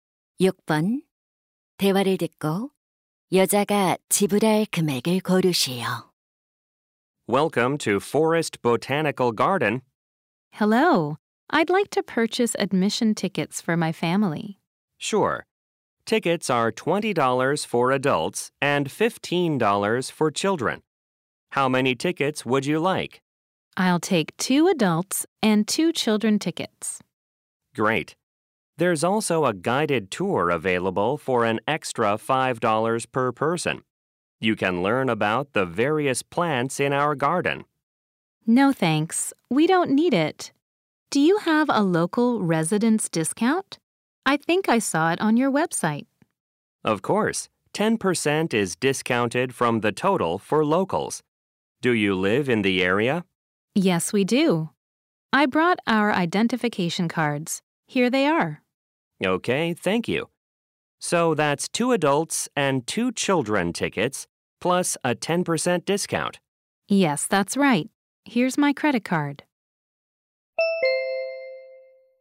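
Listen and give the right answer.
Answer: $63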